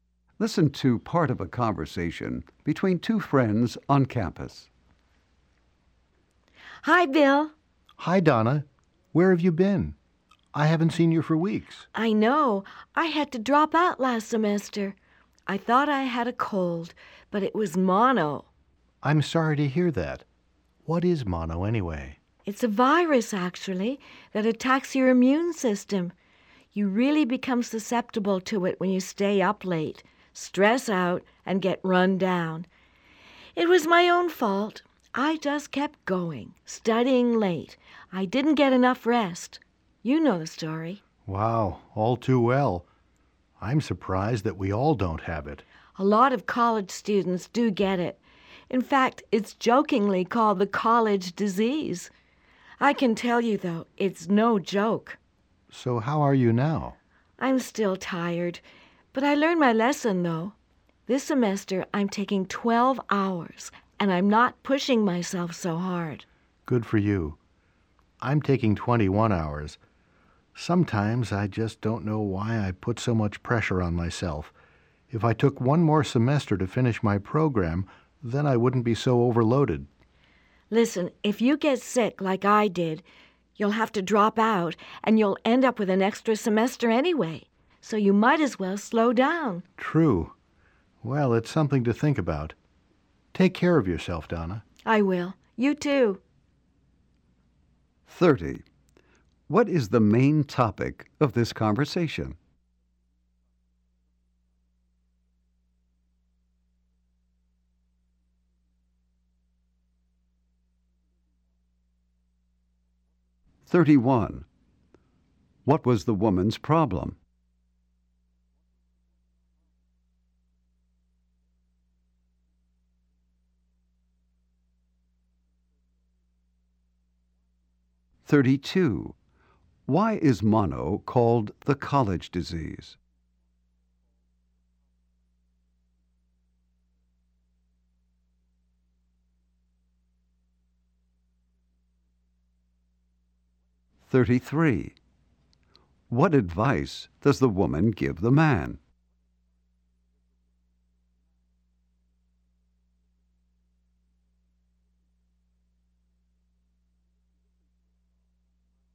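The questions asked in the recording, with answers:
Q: What is the main topic of this conversation?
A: The woman's illness, mono, and the stress of heavy course loads.

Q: What was the woman's problem?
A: She had mono and had to drop out last semester.

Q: Why is mono called the college disease?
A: A lot of college students get it.

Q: What advice does the woman give the man?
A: Slow down and take fewer hours.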